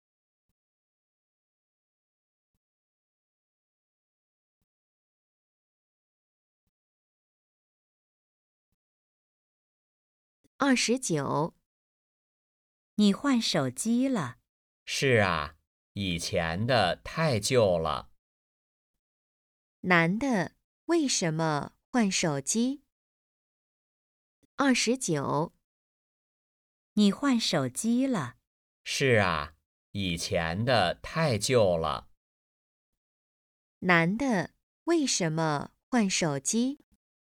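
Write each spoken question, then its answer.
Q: 男的为什么换手机?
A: 以前的太旧了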